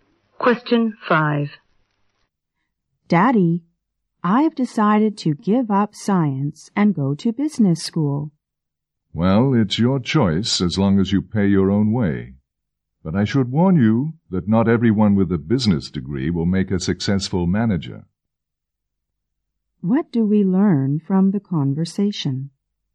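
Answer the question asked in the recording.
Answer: The father will let the child go to business school if the child pays for it.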